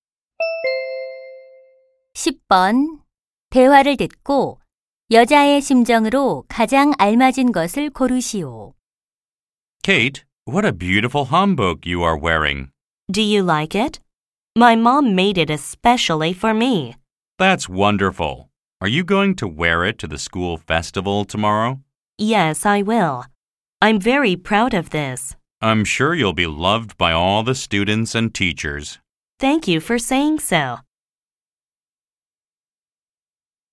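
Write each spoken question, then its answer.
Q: 대화를 듣고 여자의 심정으로 가장 알맞은 것을 고르시오.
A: 자랑스러움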